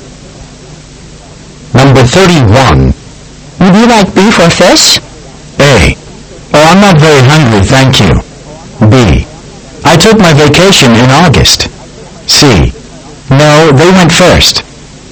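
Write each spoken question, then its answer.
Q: Would you like beef or fish?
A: A: Oh, I'm not very hungry, thank you.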